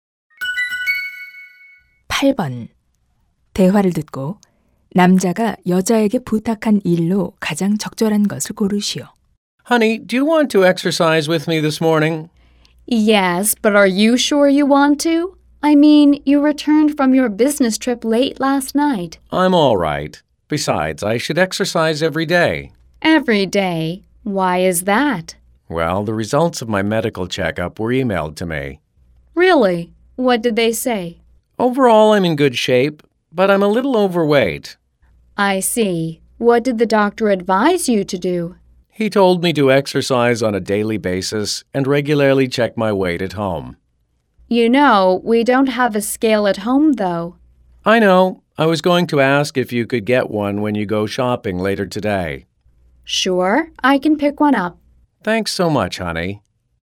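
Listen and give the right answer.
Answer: 체중계 사 오기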